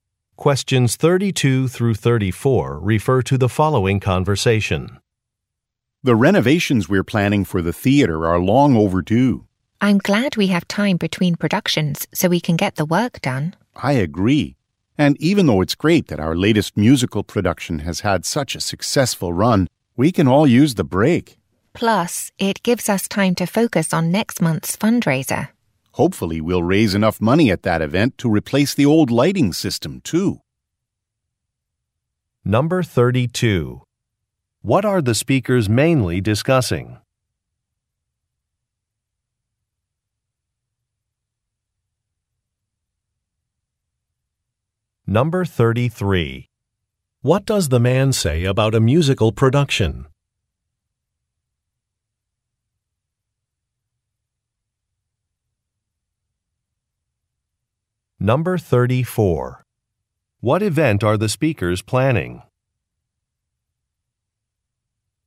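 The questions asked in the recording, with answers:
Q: What are the speakers mainly discussing?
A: Renovations planned for the theater

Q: What does the man say about a musical production?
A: It has had a successful run

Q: What event are the speakers planning?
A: A fundraiser next month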